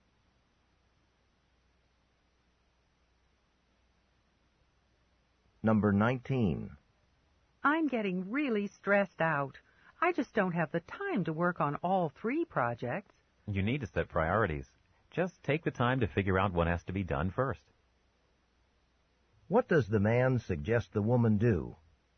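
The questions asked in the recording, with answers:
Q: What does the man suggest the woman do?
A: Set priorities and decide what to do first.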